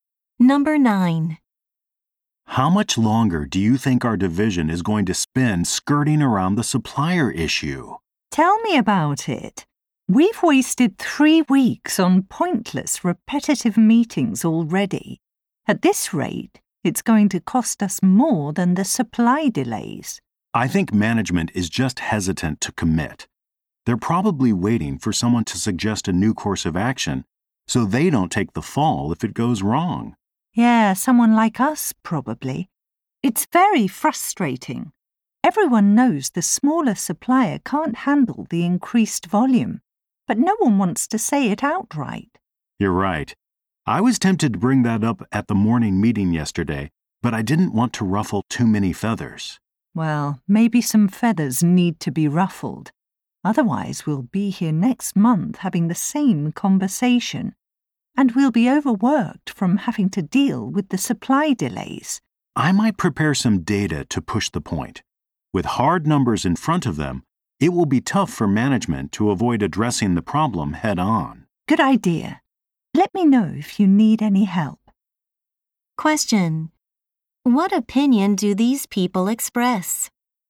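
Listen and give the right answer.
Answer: Someone needs to tell management plainly that the smaller supplier cannot handle the increased volume.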